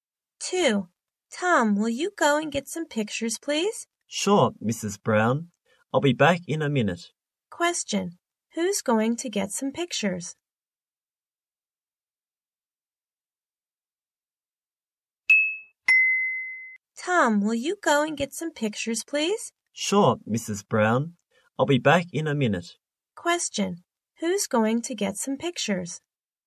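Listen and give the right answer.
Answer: Tom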